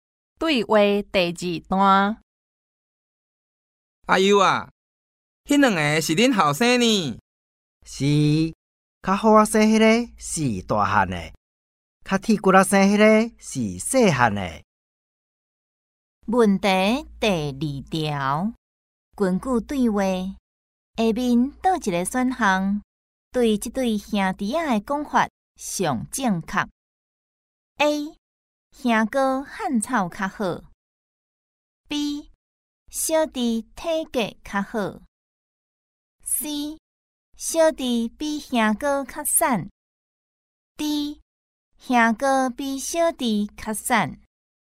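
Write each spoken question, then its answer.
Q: 根据对话,下面倒一个选项对这对兄弟仔的讲法上正确 ?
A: C: 小弟比兄哥较瘦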